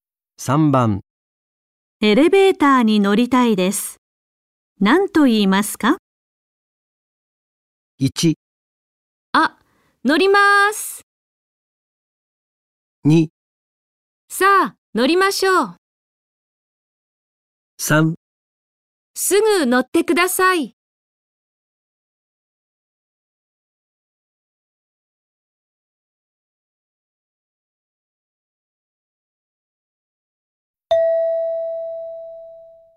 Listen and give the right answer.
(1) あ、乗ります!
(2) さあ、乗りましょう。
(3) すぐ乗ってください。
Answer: (1) あ、乗ります!

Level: N5 Listening · Test 1